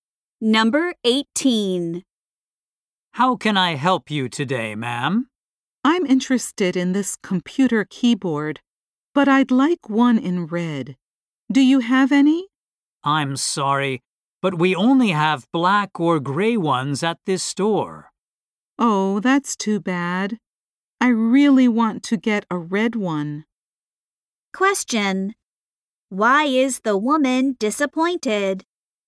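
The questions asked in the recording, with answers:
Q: Why is the woman disappointed?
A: The store has no red keyboards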